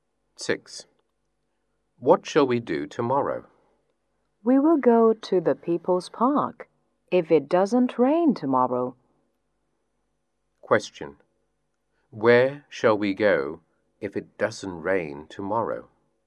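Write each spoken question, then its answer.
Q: Where shall we go if it doesn't rain tomorrow?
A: The People's Park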